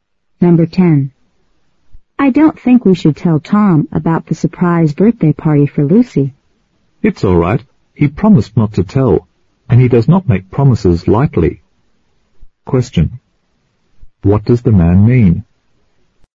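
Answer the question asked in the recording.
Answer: Tom can be trusted to keep the secret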